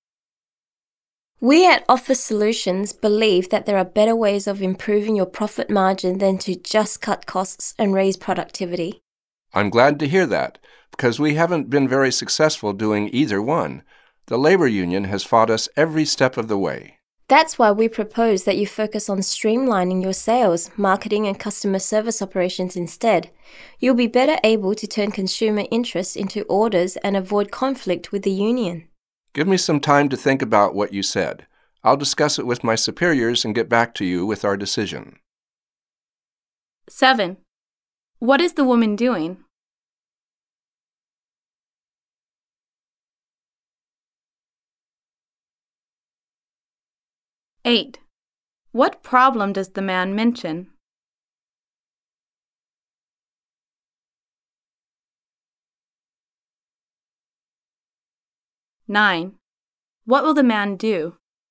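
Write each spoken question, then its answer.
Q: What is the woman doing?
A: Pitching her company's consulting services to improve his profit margin

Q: What problem does the man mention?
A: The labor union has opposed their efforts to cut costs and raise productivity

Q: What will the man do?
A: Discuss the proposal with his superiors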